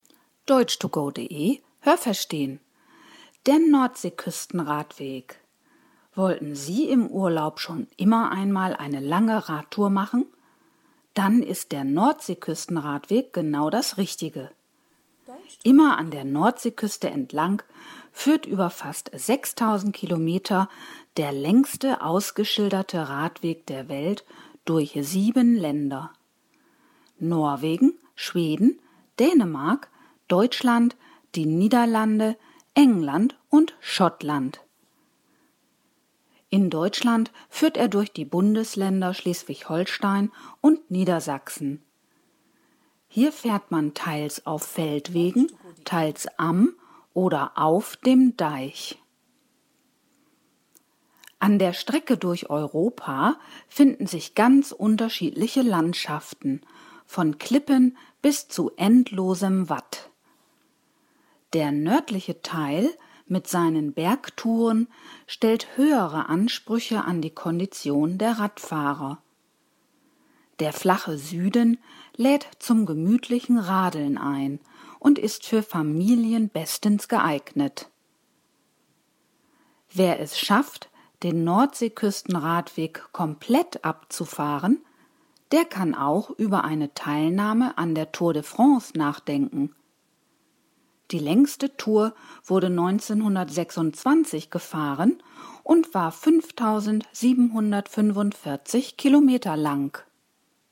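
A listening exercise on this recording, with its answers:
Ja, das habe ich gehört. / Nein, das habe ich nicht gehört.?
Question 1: Der Nordseeküsten-Radweg führt durch sechs Länder.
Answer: Nein, das habe ich nicht gehört.

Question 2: Die Strecke dieses Radwegs ist fast 6.000 Kilometer lang.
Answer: Ja, das habe ich gehört.

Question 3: Der Nordseeküsten-Radweg ist der längste ausgeschilderte Radweg der Welt.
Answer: Ja, das habe ich gehört.

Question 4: In Deutschland führt der Radweg durch zwei Bundesländer.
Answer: Ja, das habe ich gehört.

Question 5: An der deutschen Küste fährt man auf dieser Tour auch an Deichen entlang oder direkt auf ihnen.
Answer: Ja, das habe ich gehört.

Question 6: Der nördliche Teil des Radwegs ist sehr einfach.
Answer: Nein, das habe ich nicht gehört.

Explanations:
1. Er führt durch sieben Länder. (Schottland und England werden hier als Länder gezählt.)
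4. Nämlich durch Schleswig-Holstein und Niedersachsen.
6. Hier braucht man eine gute Kondition, da es Bergtouren gibt.

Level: A2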